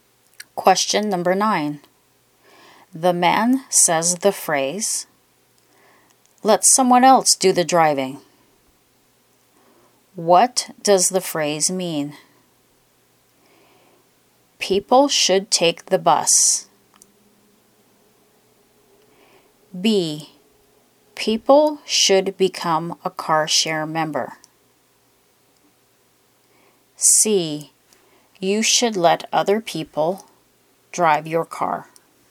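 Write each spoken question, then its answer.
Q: The man says the phrase, let someone else do the driving. What does the phrase mean?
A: A: People should take the bus.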